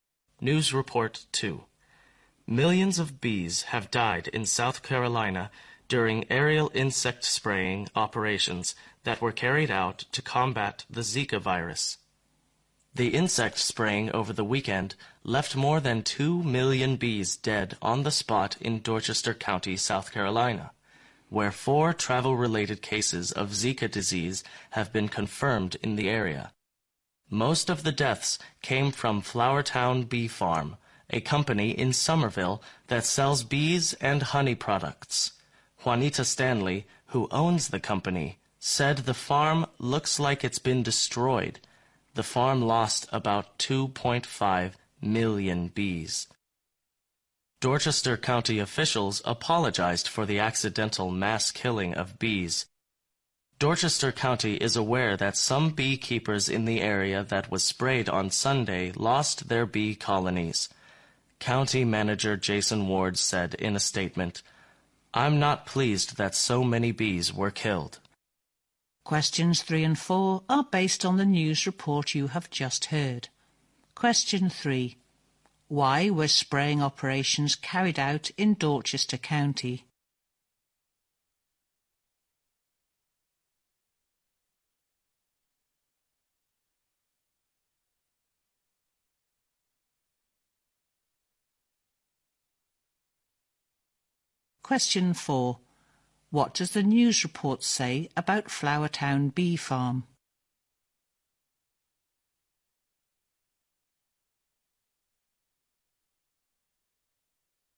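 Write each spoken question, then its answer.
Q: Why were spraying operations carried out in Dorchester County?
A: To combat the Zika virus.

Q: What does the news report say about Flowertown Bee Farm?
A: It lost about 2.5 million bees in the spraying.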